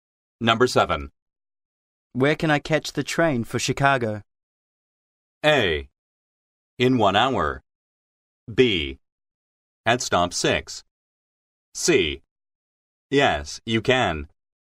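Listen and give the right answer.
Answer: B: At stop 6.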